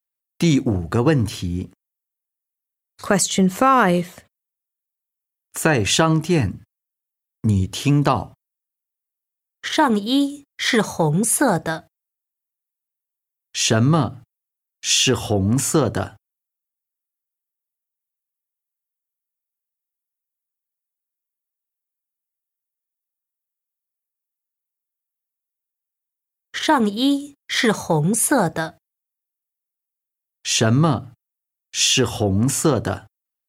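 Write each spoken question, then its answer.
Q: 什么是红色的?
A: 上衣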